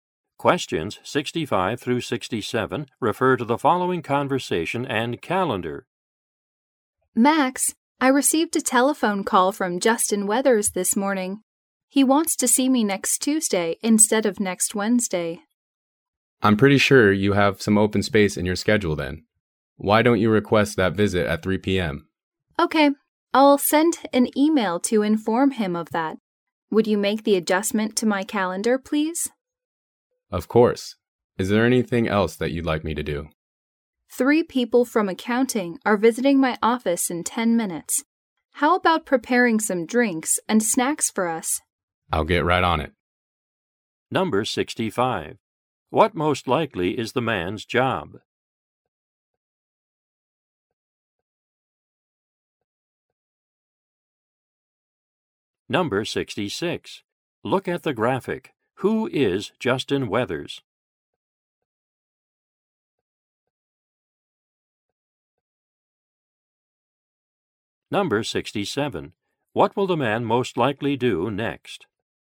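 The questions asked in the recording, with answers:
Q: What most likely is the man's job?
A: Assistant/secretary

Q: What will the man most likely do next?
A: Prepare drinks and snacks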